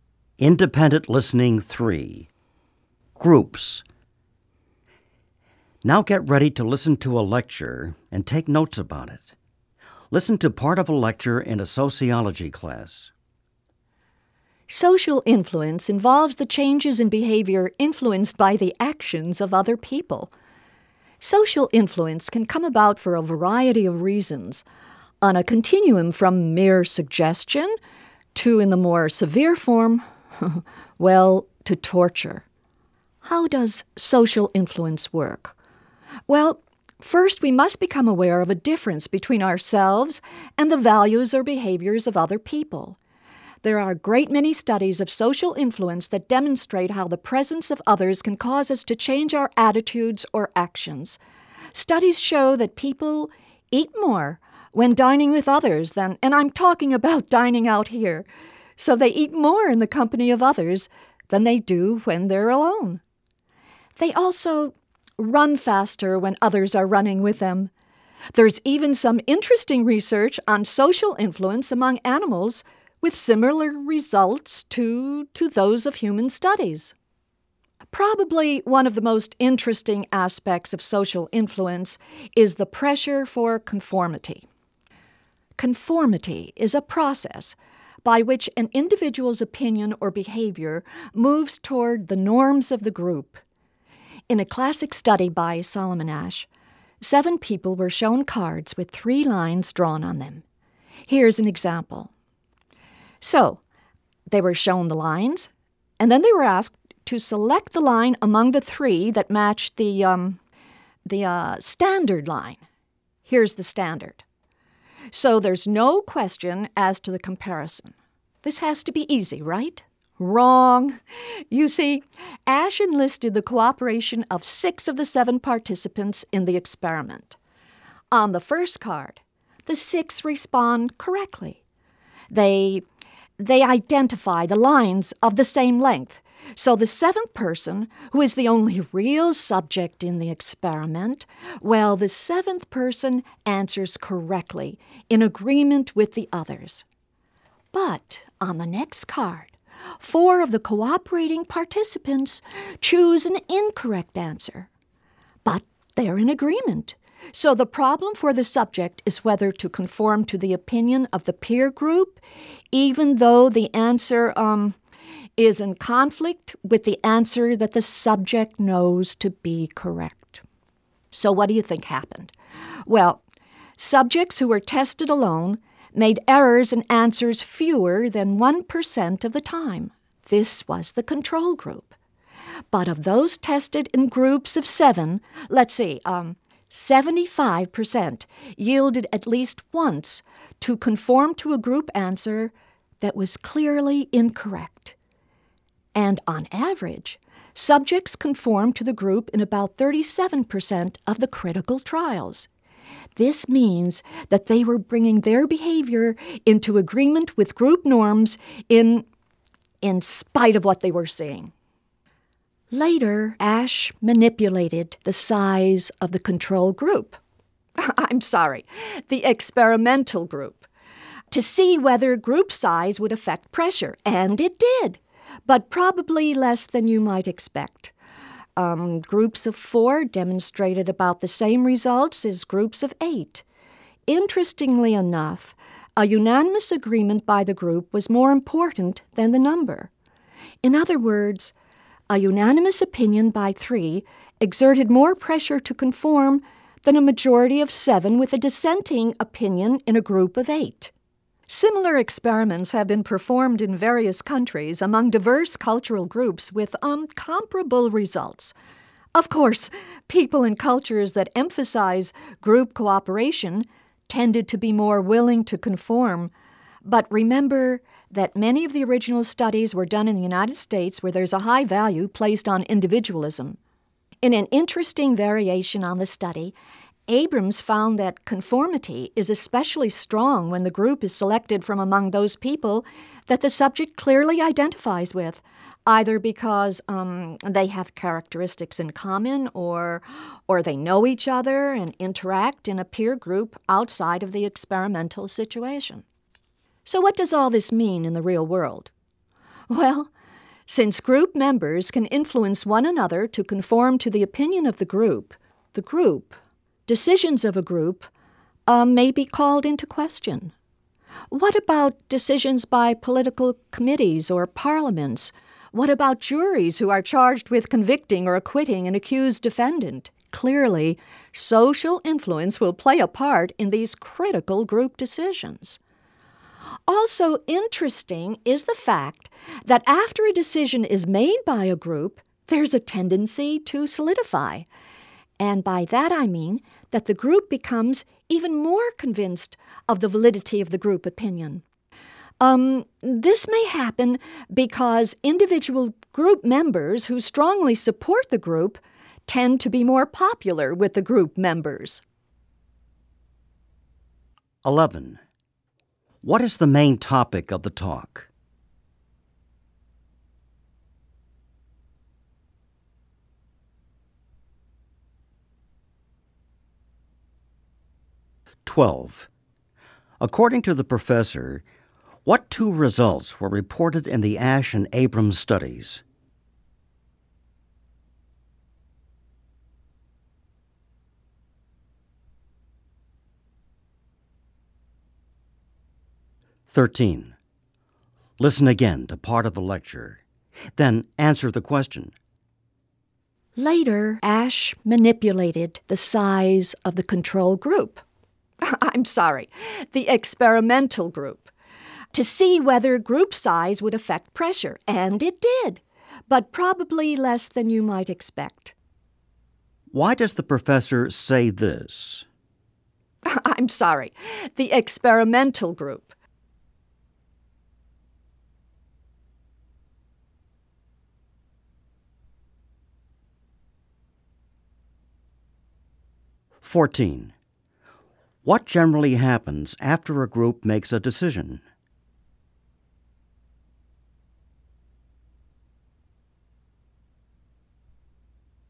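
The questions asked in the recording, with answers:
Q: What is the main topic of the talk?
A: Social influence and the pressure to conform

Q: Why does the professor say this?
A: To correct a mistake he made

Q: What generally happens after a group makes a decision?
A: The group becomes even more convinced that its opinion is right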